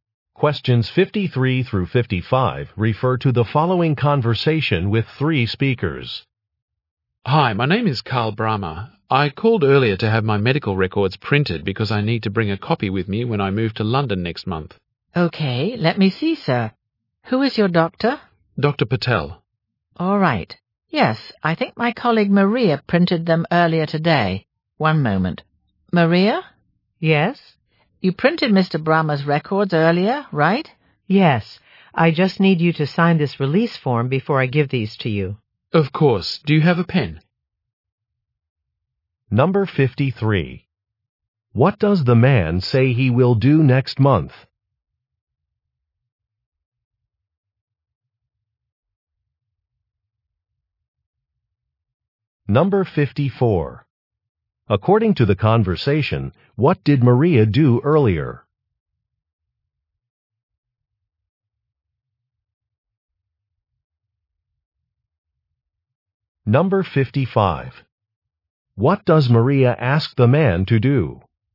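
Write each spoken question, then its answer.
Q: What does the man say he will do next month?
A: Move to London

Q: According to the conversation, what did Maria do earlier?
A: Printed his medical records

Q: What does Maria ask the man to do?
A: Sign a release form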